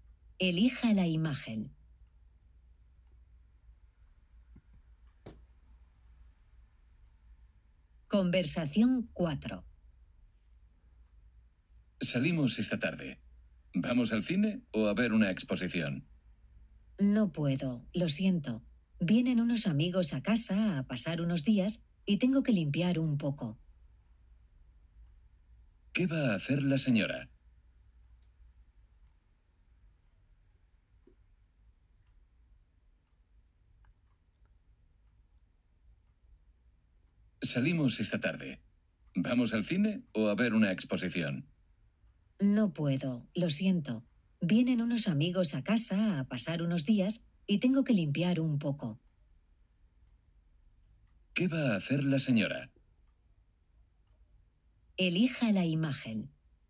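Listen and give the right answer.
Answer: Limpiar la casa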